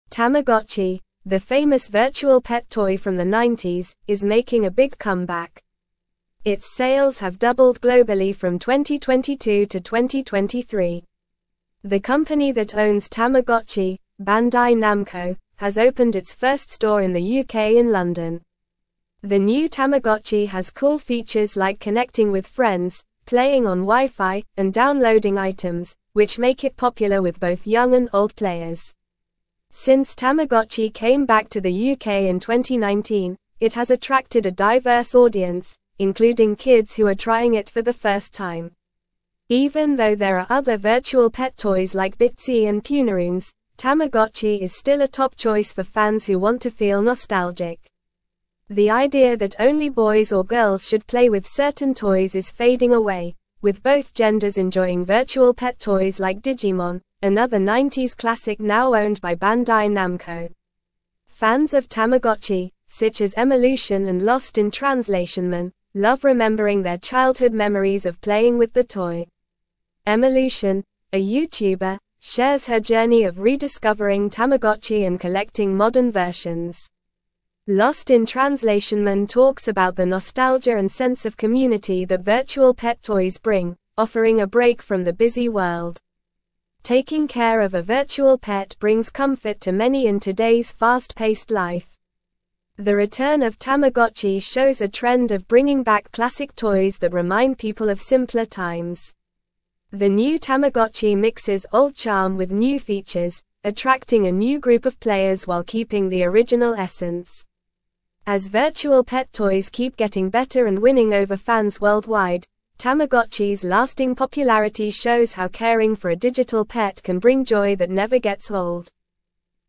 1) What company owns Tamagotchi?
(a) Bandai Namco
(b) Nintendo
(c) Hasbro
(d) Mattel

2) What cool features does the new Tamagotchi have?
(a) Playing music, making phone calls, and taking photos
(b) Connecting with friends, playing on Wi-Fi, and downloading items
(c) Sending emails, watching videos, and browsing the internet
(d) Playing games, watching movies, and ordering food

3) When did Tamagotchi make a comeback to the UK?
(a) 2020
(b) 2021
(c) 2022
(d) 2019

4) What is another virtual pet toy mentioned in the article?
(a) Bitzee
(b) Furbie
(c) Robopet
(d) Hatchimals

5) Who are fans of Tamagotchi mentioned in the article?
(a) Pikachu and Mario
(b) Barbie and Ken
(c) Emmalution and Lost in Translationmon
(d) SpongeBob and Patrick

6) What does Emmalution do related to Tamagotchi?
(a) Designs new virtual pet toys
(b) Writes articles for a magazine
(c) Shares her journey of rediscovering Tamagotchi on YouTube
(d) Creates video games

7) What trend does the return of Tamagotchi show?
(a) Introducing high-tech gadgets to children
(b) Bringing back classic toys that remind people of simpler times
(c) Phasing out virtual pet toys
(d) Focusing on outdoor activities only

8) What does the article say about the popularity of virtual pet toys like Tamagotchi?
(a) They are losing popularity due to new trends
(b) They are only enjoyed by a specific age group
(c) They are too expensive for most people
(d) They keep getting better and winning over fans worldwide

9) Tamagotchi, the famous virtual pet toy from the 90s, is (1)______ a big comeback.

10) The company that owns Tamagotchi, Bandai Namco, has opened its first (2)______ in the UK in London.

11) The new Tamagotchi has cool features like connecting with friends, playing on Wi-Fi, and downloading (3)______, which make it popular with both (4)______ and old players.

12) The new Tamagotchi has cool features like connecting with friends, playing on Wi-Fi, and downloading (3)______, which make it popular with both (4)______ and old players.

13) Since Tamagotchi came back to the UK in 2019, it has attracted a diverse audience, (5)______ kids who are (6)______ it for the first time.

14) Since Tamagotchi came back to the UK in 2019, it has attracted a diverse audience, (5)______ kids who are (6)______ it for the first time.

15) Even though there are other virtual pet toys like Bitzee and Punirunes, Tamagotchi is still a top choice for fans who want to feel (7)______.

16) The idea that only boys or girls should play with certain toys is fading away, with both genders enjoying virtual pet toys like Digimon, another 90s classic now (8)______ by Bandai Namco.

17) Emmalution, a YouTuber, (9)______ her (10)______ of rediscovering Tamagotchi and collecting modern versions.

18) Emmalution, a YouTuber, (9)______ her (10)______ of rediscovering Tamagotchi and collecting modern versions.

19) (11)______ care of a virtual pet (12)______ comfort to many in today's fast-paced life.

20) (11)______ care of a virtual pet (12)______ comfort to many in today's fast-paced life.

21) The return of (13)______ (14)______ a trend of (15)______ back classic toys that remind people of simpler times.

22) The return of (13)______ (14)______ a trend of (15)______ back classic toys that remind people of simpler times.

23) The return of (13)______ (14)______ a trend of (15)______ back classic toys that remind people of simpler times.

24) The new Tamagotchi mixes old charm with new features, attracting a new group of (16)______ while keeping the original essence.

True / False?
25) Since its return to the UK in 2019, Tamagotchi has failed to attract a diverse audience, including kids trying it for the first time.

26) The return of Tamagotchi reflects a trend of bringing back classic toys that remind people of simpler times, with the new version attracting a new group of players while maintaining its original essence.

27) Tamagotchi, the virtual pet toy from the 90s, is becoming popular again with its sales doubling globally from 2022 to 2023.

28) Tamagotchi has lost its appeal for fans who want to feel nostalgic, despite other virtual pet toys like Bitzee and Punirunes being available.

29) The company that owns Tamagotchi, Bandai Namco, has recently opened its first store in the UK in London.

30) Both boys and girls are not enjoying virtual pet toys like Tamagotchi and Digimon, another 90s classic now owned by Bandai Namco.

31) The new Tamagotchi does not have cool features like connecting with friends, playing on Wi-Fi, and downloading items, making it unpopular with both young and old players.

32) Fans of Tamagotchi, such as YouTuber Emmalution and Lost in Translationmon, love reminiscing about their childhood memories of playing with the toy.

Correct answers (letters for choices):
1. a
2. b
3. d
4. a
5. c
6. c
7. b
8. d
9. making
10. store
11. items
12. young
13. including
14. trying
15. nostalgic
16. owned
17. shares
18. journey
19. Taking
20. brings
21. Tamagotchi
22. shows
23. bringing
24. players
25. False
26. True
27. True
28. False
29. True
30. False
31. False
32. True

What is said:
Tamagotchi, the famous virtual pet toy from the 90s, is making a big comeback. Its sales have doubled globally from 2022 to 2023. The company that owns Tamagotchi, Bandai Namco, has opened its first store in the UK in London. The new Tamagotchi has cool features like connecting with friends, playing on Wi-Fi, and downloading items, which make it popular with both young and old players.
Since Tamagotchi came back to the UK in 2019, it has attracted a diverse audience, including kids who are trying it for the first time. Even though there are other virtual pet toys like Bitzee and Punirunes, Tamagotchi is still a top choice for fans who want to feel nostalgic. The idea that only boys or girls should play with certain toys is fading away, with both genders enjoying virtual pet toys like Digimon, another 90s classic now owned by Bandai Namco.
Fans of Tamagotchi, such as Emmalution and Lost in Translationmon, love remembering their childhood memories of playing with the toy. Emmalution, a YouTuber, shares her journey of rediscovering Tamagotchi and collecting modern versions. Lost in Translationmon talks about the nostalgia and sense of community that virtual pet toys bring, offering a break from the busy world. Taking care of a virtual pet brings comfort to many in today's fast-paced life.
The return of Tamagotchi shows a trend of bringing back classic toys that remind people of simpler times. The new Tamagotchi mixes old charm with new features, attracting a new group of players while keeping the original essence. As virtual pet toys keep getting better and winning over fans worldwide, Tamagotchi's lasting popularity shows how caring for a digital pet can bring joy that never gets old.

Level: Level 3